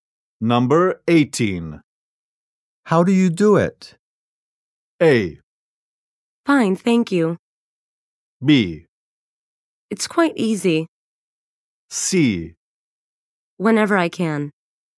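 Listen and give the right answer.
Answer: B: It's quite easy.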